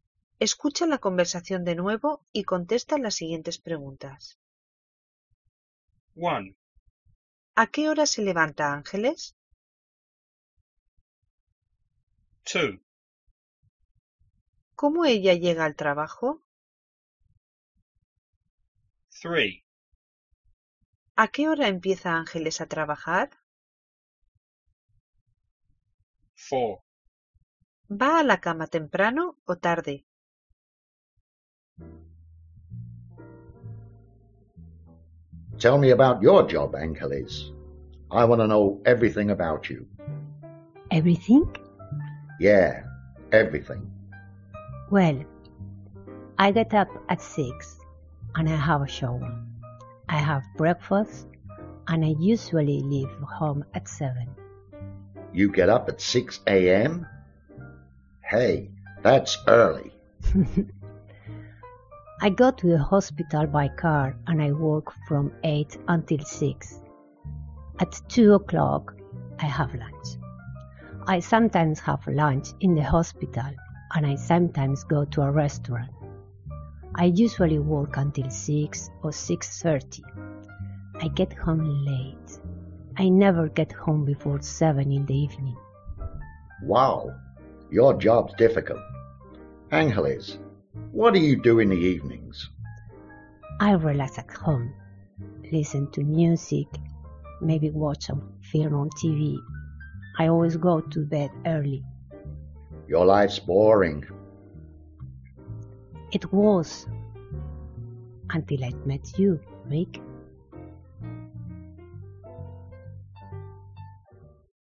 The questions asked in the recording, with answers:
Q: ¿A qué hora se levanta Ángeles?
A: Se levanta a las 6.

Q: ¿Cómo ella llega al trabajo?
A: Voy al hospital en coche.

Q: ¿A qué hora empieza Ángeles a trabajar?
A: Ángeles empieza a las 8 de la mañana.

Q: ¿Va a la cama temprano o tarde?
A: Siempre voy a la cama temprano.